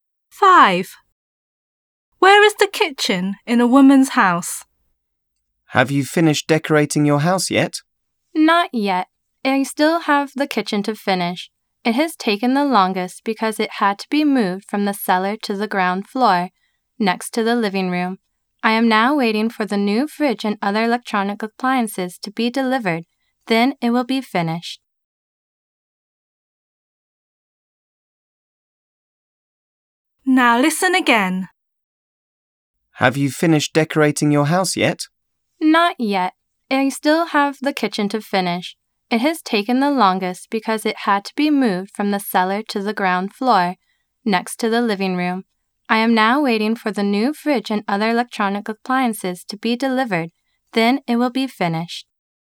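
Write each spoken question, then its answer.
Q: Where is the kitchen in a woman's house?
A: On the ground floor, next to the living room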